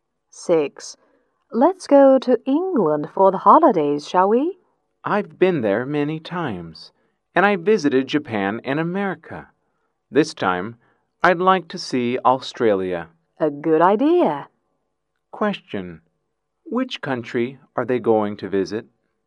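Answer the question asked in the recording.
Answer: Australia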